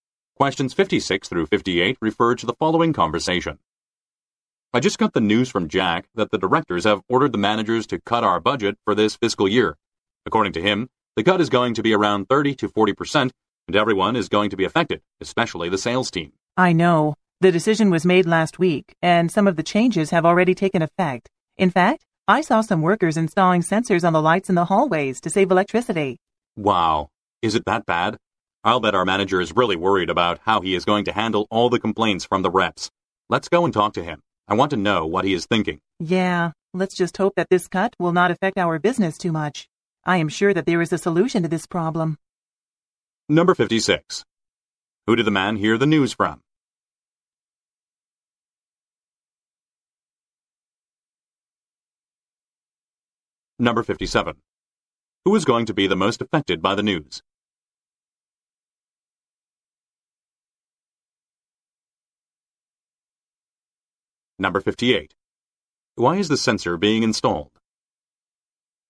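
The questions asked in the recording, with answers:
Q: Who did the man hear the news from?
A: Jack

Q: Who is going to be the most affected by the news?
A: The sales team

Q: Why is the sensor being installed?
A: To save electricity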